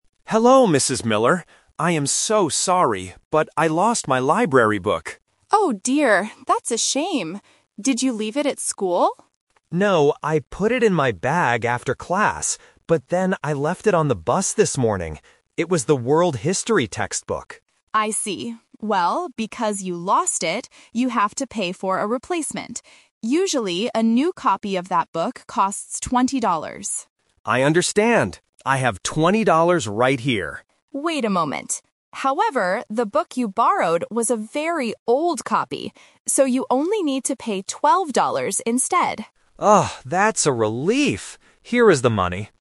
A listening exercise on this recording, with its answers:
Listen to a conversation between a borrower and a librarian. Choose the correct answer A, B, or C.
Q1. Where did the man leave the library book?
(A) At school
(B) In his bag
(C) On the bus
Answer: (C) On the bus

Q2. Which book did the man lose?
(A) A world history book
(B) A local geography book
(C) A storybook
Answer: (A) A world history book

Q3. How much money does the man have to pay?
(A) $12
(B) $20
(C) $8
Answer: (A) $12

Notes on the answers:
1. Alex clearly says, "I left it on the bus this morning." Trap: Option A (at school) is a trap because the librarian guesses this first, but Alex says "No". Option B (in his bag) is a trap because he put it there initially, but that's not where he left (lost) it.
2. Alex says, "It was the 'World History' textbook." Trap: Options B and C are distractors that belong to the same topic category (types of books) but are not mentioned in the audio.
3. Option B ($20) is a very strong trap. It is the "usual" price, and Alex even offers to pay $20 at first. Option C ($8) is a "Math Trap" (20 - 12 = 8), designed to confuse students who try to do math while listening.

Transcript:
Alex: Hello, Mrs. Miller. I am so sorry, but I lost my library book.
Mrs. Miller: Oh dear. That's a shame. Did you leave it at school?
Alex: No, I put it in my bag after class. But then I left it on the bus this morning. It was the "World History" textbook.
Mrs. Miller: I see. Well, because you lost it, you have to pay for a replacement. Usually, a new copy of that book costs $20.
Alex: I understand. I have $20 right here.
Mrs. Miller: Wait a moment. However, the book you borrowed was a very old copy. So, you only need to pay $12 instead.

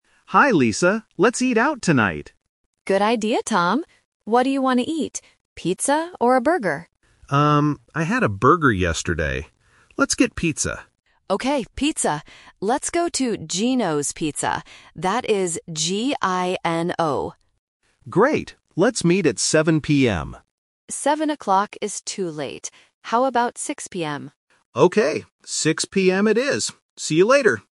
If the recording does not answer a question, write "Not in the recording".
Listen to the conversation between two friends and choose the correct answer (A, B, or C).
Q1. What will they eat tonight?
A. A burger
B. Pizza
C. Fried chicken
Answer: B. Pizza

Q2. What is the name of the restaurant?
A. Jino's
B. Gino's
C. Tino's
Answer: B. Gino's

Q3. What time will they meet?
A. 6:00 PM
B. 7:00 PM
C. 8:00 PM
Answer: A. 6:00 PM

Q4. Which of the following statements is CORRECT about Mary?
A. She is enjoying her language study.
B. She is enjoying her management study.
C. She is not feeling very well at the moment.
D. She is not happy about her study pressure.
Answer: Not in the recording

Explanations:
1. Tom says, "Let's get pizza," and Lisa agrees. Why the trap is wrong: Option A (A burger) is a trap. The word "burger" is mentioned in the audio, but Tom says he had it yesterday, so he doesn't want it today. Option C is not mentioned.
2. Lisa spells the name of the restaurant clearly: "G-I-N-O". Why the trap is wrong: Option A (Jino's) sounds exactly the same as Gino's, which is a common phonetic trap in A1 listening tests to check if students catch the spelling "G". Option C is not mentioned.
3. Lisa suggests 6:00 PM and Tom agrees by saying, "Okay, 6:00 PM it is!" Why the trap is wrong: Option B (7:00 PM) is a trap. Tom suggests 7:00 PM first, but Lisa rejects it because it is "too late." Option C is not mentioned.

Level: A1

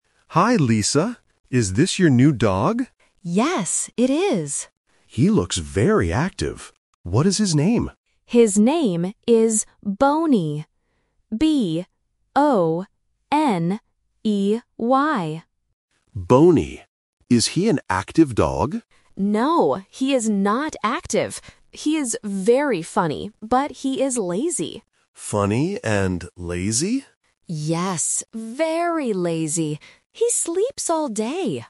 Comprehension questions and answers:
Listen to the conversation and choose the correct answer for each question.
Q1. What is the name of the new dog?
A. Tony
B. Boney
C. Cody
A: B. Boney

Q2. How does Lisa describe her dog?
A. Active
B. Funny and lazy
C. Mean and angry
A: B. Funny and lazy

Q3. What does the dog do all day?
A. He sleeps.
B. He eats.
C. He runs.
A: A. He sleeps.

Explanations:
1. The correct answer is (B). Lisa spells the dog's name clearly: "B-O-N-E-Y." Options (A) "Tony" and (C) "Cody" are sound traps because they rhyme or sound very similar to "Boney."
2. The correct answer is (B). Lisa says, "He is very funny, but he is lazy." Option (A) "Active" is the trap; Mark thinks the dog is active, but Lisa explicitly says, "No, he is not active." Option (C) "Mean and angry" is plausible for a dog's personality but is never mentioned.
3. The correct answer is (A) because Lisa says, "He sleeps all day!" Option (C) "He runs" is a trap because it connects to the word "active" which was rejected. Option (B) "He eats" is plausible for a lazy dog but is not mentioned in the audio.

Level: A1

